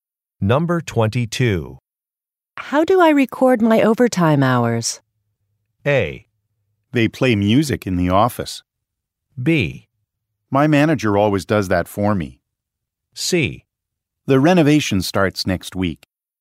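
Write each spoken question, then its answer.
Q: How do I record my overtime hours?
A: B: My manager always does that for me.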